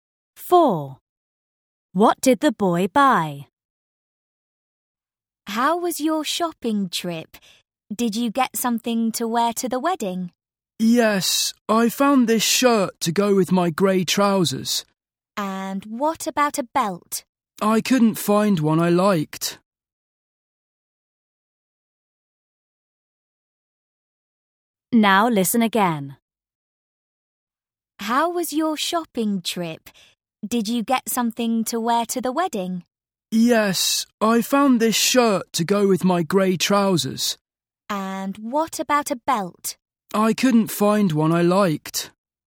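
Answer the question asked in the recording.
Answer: a shirt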